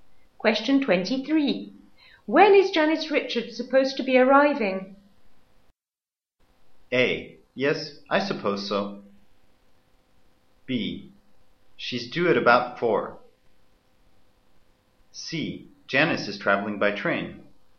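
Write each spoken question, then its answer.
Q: When is Janice Richards supposed to be arriving?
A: B: She's due at about 4.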